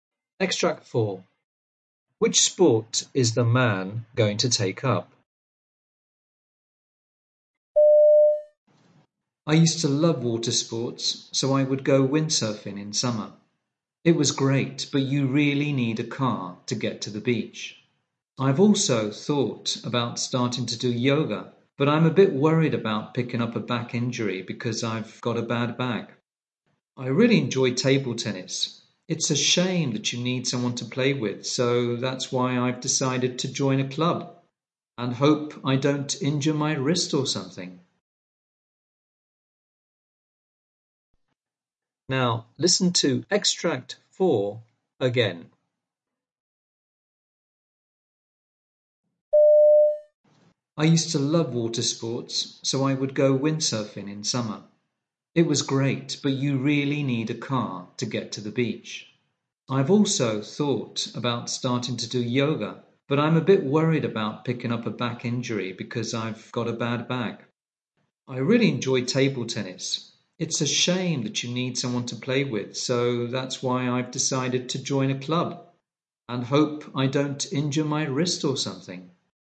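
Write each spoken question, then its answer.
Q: Which sport is the man going to take up?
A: Table tennis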